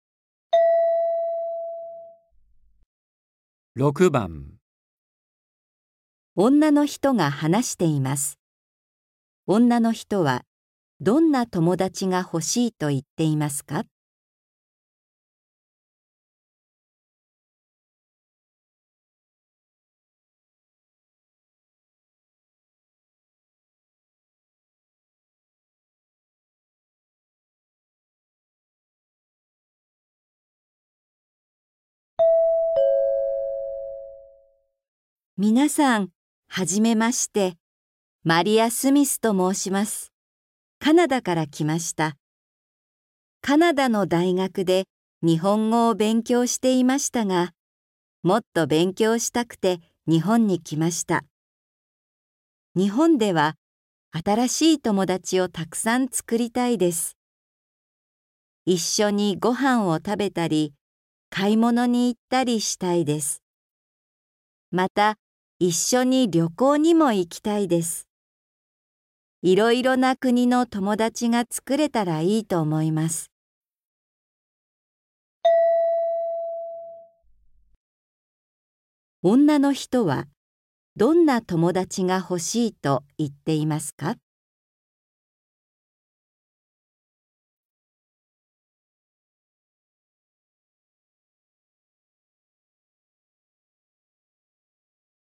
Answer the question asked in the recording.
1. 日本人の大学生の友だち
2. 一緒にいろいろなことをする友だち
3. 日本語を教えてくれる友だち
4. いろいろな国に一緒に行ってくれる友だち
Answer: 2. 一緒にいろいろなことをする友だち

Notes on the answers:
一緒にご飯を食べたり、買い物に行ったりしたいです。また、一緒に旅行にも行きたいです。

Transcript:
女の人は、どんな友だちがほしいと言っていますか。みなさん、初めまして。マリア・スミスと申します。カナダから来ました。カナダ大学で日本語を勉強していましたが、もっと勉強したくて、日本に来ました。日本では、新しい友だちをたくさんつくりたいです。一緒にご飯を食べたり、買い物に行ったりしたいです。また、一緒に旅行にも行きたいです。いろいろな国の友だちが作れたらいいと思います。

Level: 初級